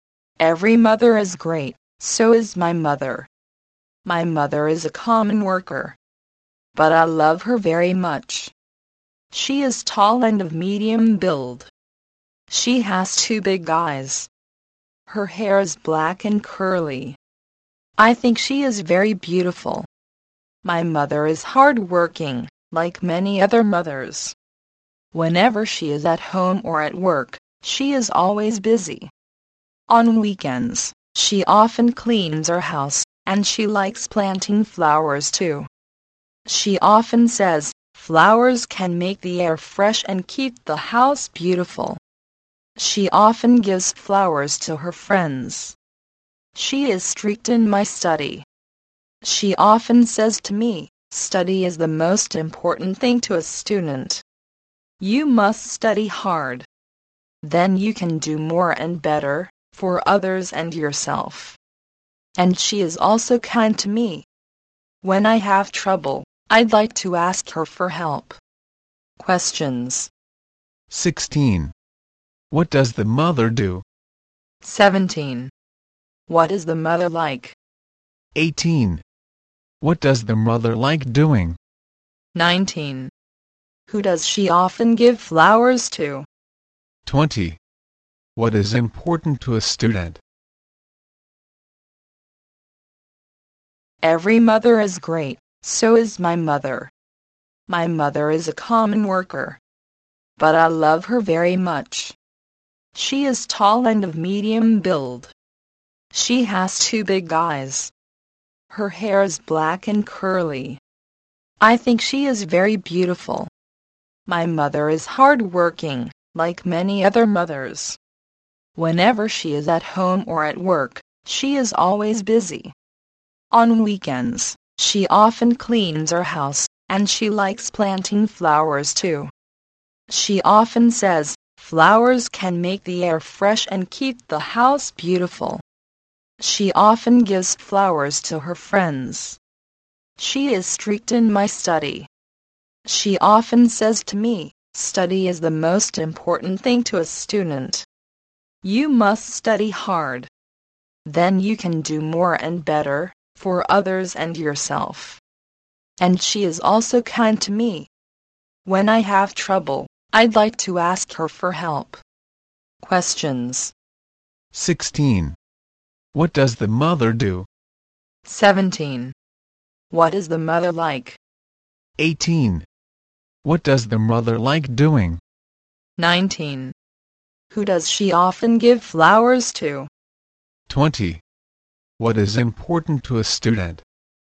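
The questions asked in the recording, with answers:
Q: 16. What does the mother do?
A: She is a worker

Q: 18. What does the mother like doing?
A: Planting flowers

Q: 19. Who does she often give flowers to?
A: Her friends

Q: 20. What is important to a student?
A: Study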